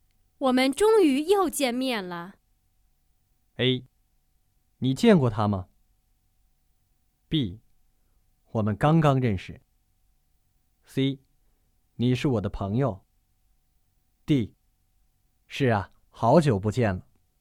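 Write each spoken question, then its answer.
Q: 我们终于又见面了。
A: D: 是啊,好久不见了。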